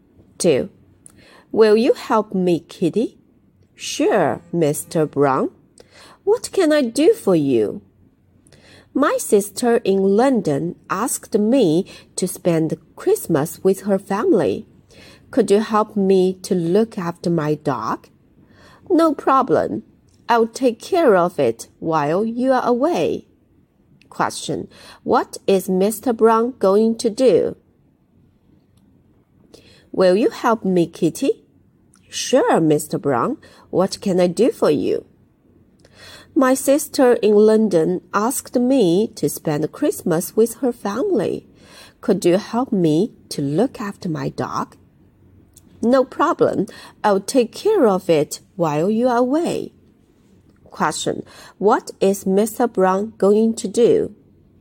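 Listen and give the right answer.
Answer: He is going to spend Christmas with his sister's family in London.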